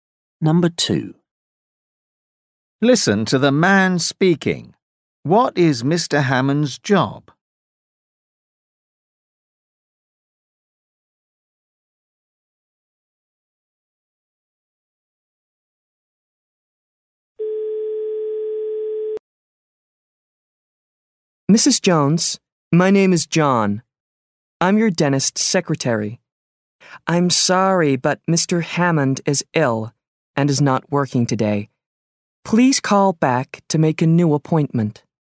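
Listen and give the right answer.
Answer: Dentist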